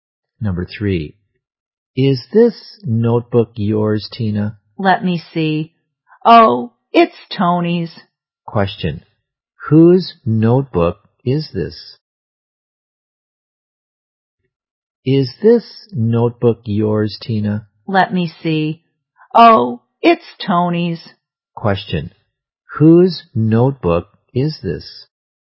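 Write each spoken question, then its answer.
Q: Question, whose notebook is this?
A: Tony's.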